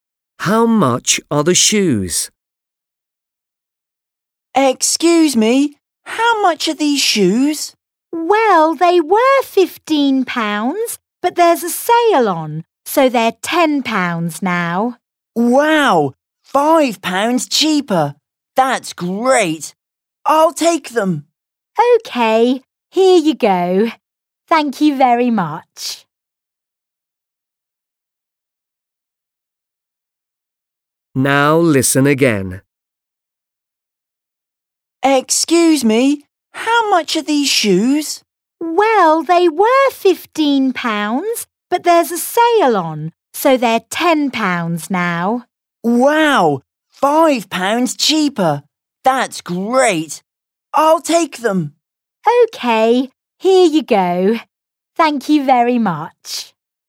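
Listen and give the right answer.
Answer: £10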